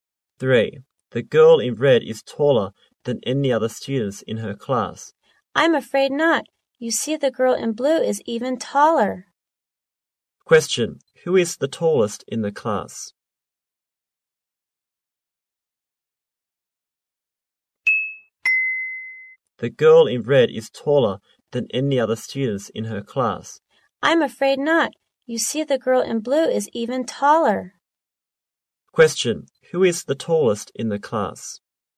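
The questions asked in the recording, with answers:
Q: Who is the tallest in the class?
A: The girl in blue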